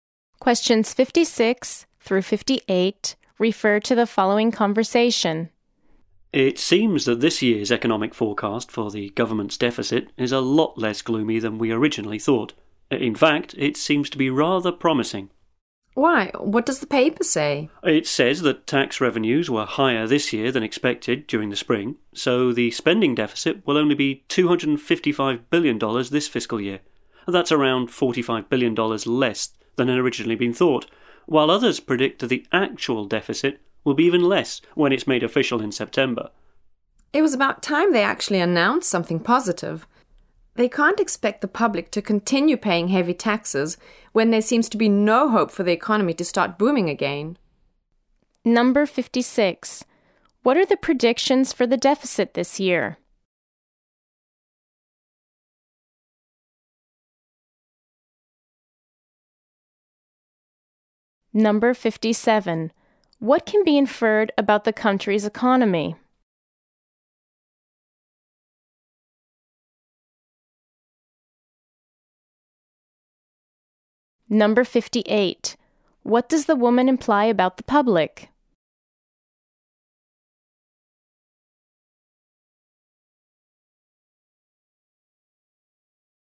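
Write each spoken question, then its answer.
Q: What are the predictions for the deficit this year?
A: It will be $255 billion or less, lower than expected

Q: What does the woman imply about the public?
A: They are tired of paying heavy taxes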